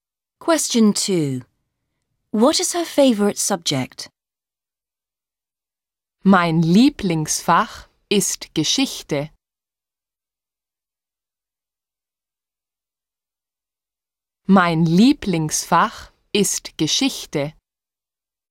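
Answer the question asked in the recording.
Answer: History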